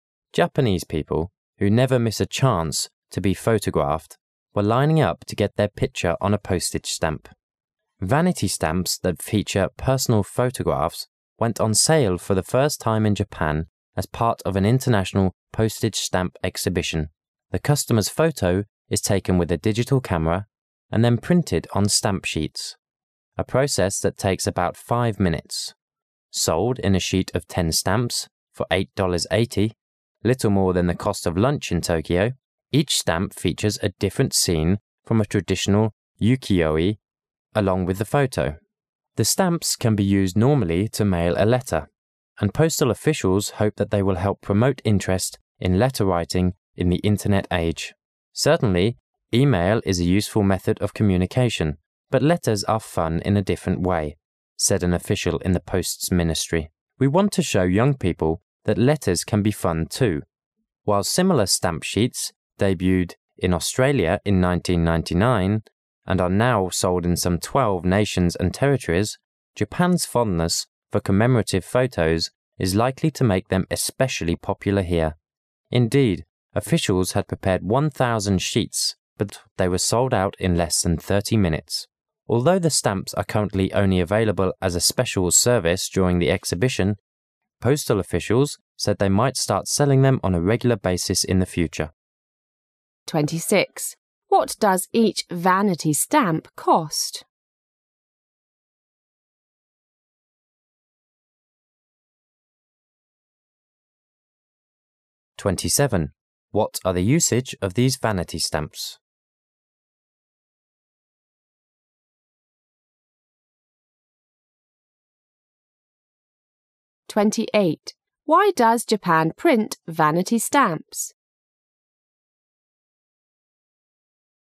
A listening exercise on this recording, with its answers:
Passage One Questions 26 to 28 are based on the passage you have just heard.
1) Why does Japan print vanity stamps?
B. Because the Japanese like writing letters to each other.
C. Because the Japanese postal officials want to print a special stamp to catch worldwide attention.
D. Because the Japanese postal officials hope these stamps will help promote interests in letter writing.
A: D. Because the Japanese postal officials hope these stamps will help promote interests in letter writing.

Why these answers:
细节题,文中明确提到答案"and the postal officials hope they will help promote interest in let ter-writing in the Internet age",后面官员又补充说"but letters are fun in a different way"。

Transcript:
[解析] 26-28 Japanese people, who never miss a chance to be photographed, were lining up to get their picture on a post age stamp. Vanity stamps that feature personal photographs went on sale for the first time in Japan as part of an international postage stamp exhibition. The customer's photo is taken with a digital camera and then printed on stamp sheets, a process that takes about five minutes. Sold in a sheet of 10 stamps for $ 8. 80, little more than the cost of lunch in Tokyo, each stamp features a different scene from a traditional ukiyo-e along with the photo. The stamps can be used normally to mail a letter, and postal officials hope they will help promote interest in letter-writing in the Internet age. "Certainly e-mail is a useful method of communication, but letters are fun in a different way," said an official in the Posts Ministry. "We want to show young people that letters can be fun too." While similar stamp sheets debuted in Australia in 1999 and are now sold in some 12 nations and territories, Japan's fondness for commemorative photos is likely to make them especially popular here. Indeed, officials had prepared 1,000 sheets but they were sold out in less than 30 minutes. Although the stamps are currently only available as a special service during the exhibition, postal officials said they might start selling them on a regular basis in the future. 26. What does each vanity stamp cost?

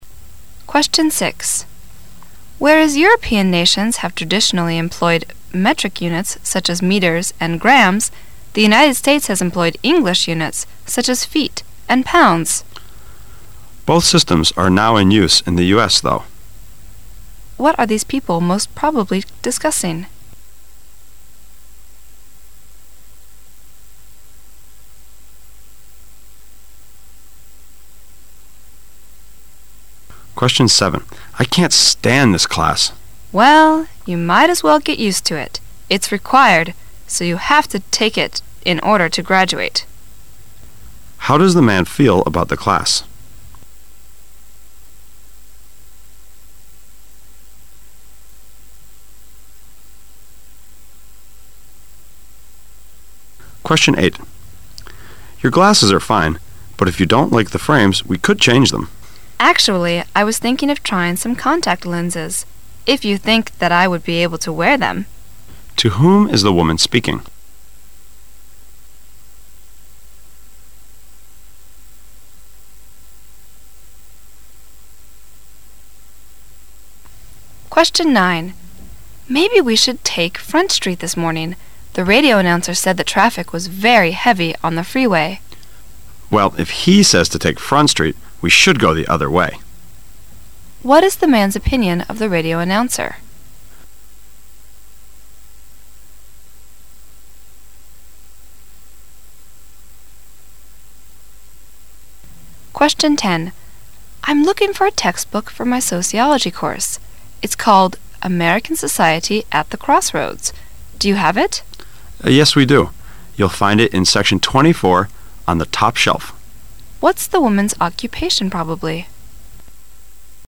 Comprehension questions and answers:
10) 10.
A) A traffic guard.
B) A sociologist.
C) A student.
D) A salesperson.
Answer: C) A student.

